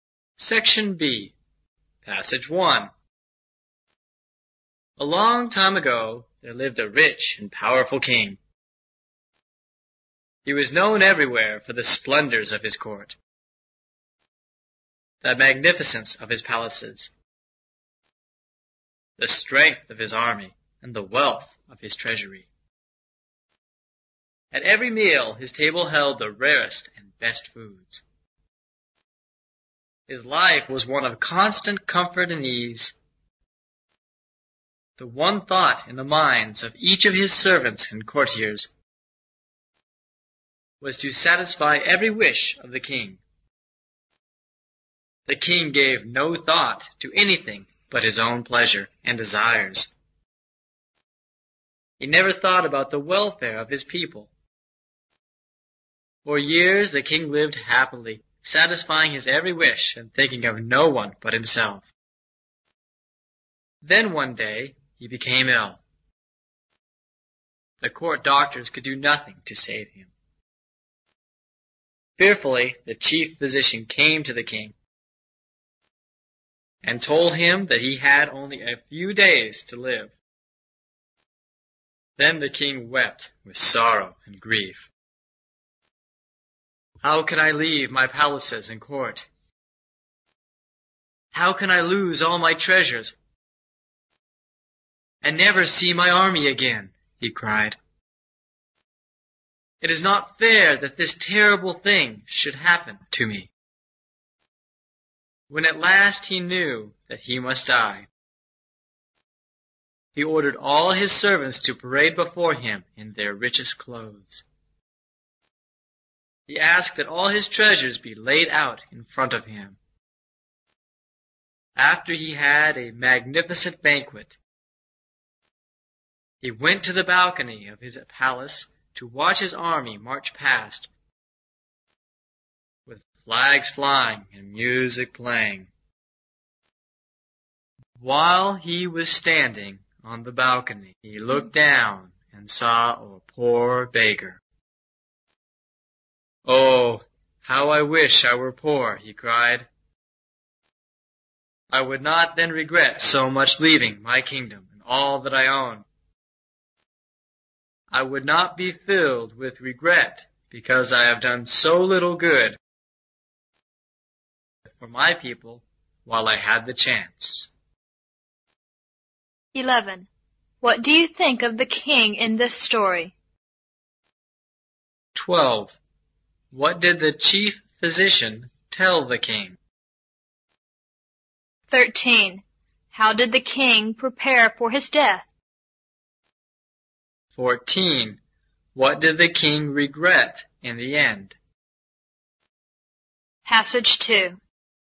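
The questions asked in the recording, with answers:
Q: What do you think of the king in this story?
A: He was selfish

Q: What did the chief physician tell the king?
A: That he had only a few days to live

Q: How did the king prepare for his death?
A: He had his servants parade in rich clothes, laid out his treasures, held a banquet and watched his army march past

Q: What did the king regret in the end?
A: That he had done so little good for his people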